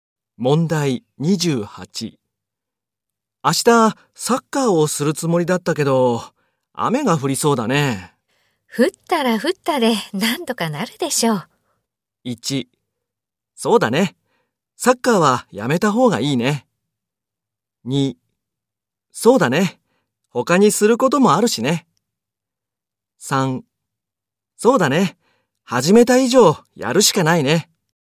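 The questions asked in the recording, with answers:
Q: 降ったら降ったでなんとかなるでしょう。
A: 2: そうだね。他にすることもあるしね。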